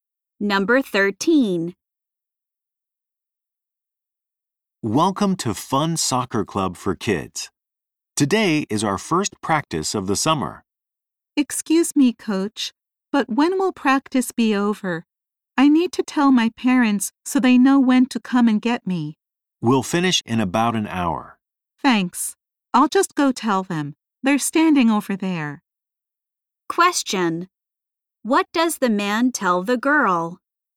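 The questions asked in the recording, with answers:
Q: What does the man tell the girl?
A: Practice will finish in about an hour.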